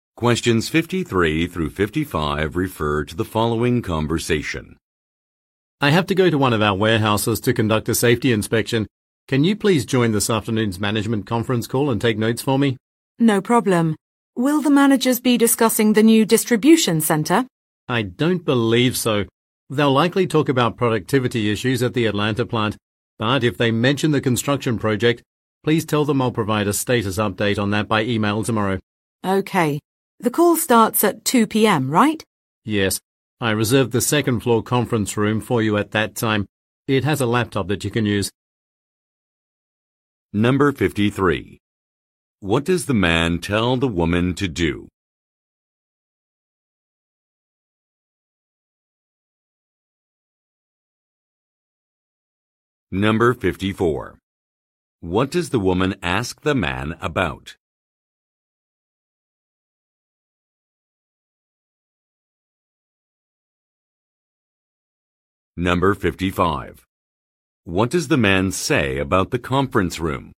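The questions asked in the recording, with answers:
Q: What does the man tell the woman to do?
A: Join a conference call and take notes

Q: What does the woman ask the man about?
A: Whether the managers will discuss the new distribution center

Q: What does the man say about the conference room?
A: He reserved it for her at 2 p.m. and it has a laptop she can use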